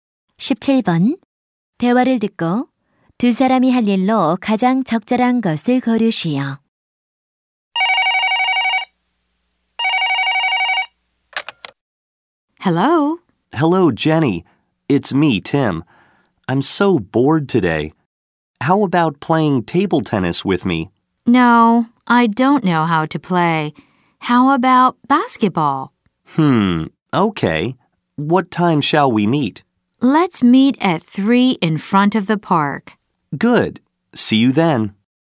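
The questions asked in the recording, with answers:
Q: 대화를 듣고 두 사람이 할 일로 가장 적절한 것을 고르시오.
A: 농구하기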